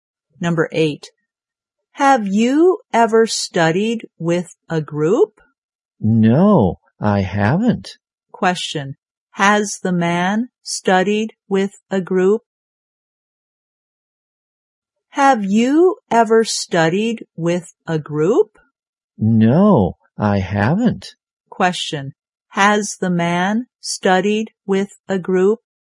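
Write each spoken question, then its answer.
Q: Has the man studied with a group?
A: No, he hasn't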